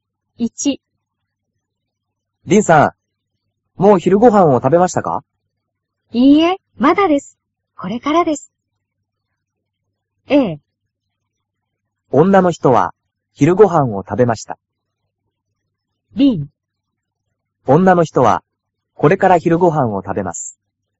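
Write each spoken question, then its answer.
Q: 女の人は昼ご飯を食べました。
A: B: 女の人はこれから昼ご飯を食べます。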